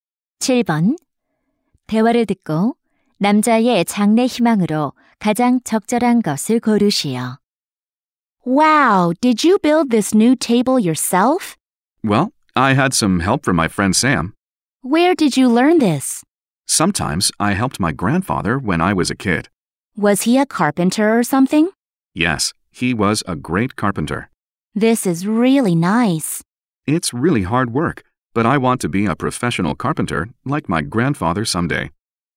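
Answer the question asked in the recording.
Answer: 목수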